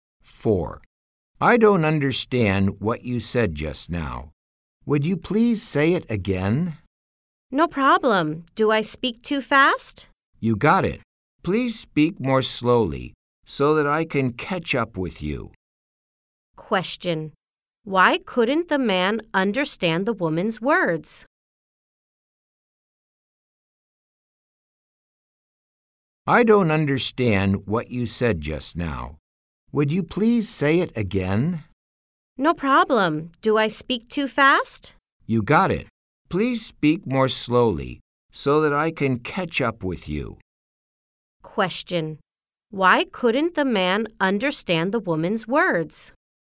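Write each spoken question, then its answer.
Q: Why couldn't the man understand the woman's words?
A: She spoke too fast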